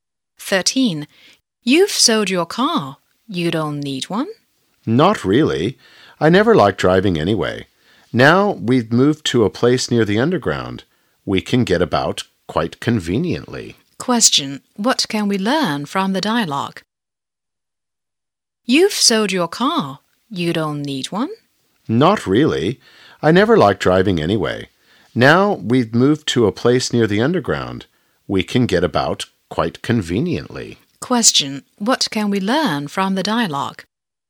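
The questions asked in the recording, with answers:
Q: Question: What can we learn from the dialogue?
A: The speaker sold the car and now lives near the underground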